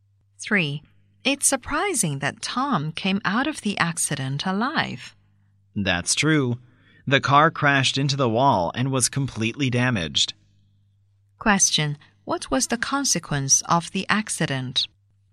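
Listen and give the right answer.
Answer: The car was completely damaged, but Tom survived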